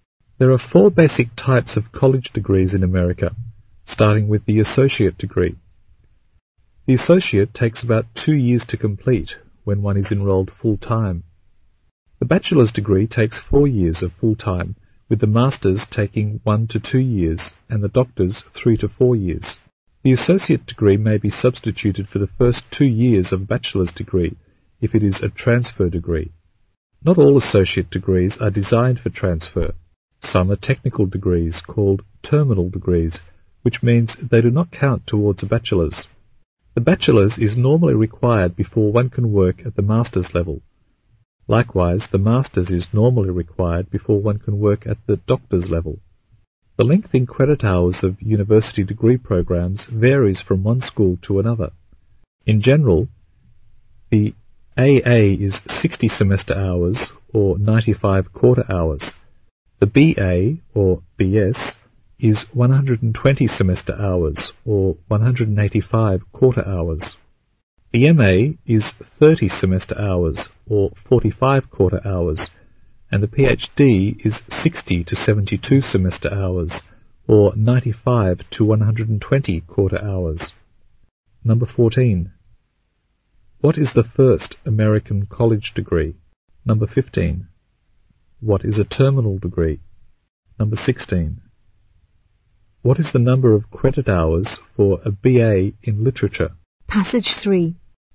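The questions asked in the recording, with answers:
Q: What is the first American college degree?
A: The associate degree

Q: What is a terminal degree?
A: A technical associate degree that doesn't count towards a bachelor's

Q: What is the number of credit hours for a BA in literature?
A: 120 semester hours or 185 quarter hours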